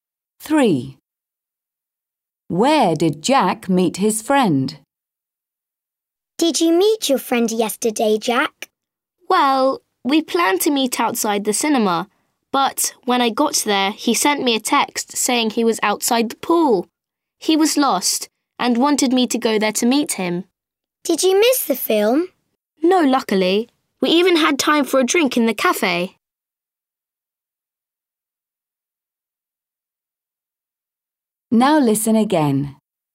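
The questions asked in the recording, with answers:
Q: Where did Jack meet his friend?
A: outside the pool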